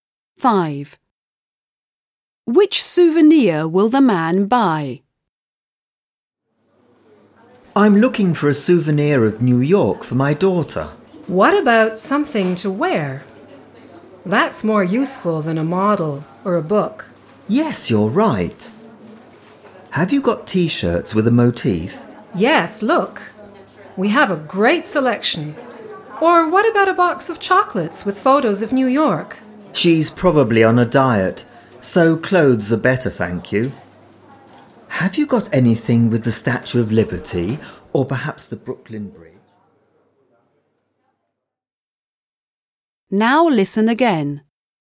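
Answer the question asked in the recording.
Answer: A T-shirt with a New York motif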